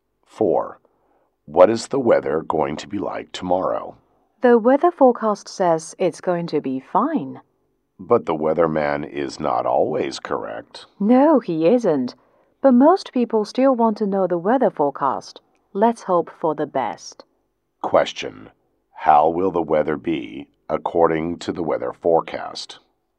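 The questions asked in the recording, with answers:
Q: how will the weather be according to the weather forecast?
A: Fine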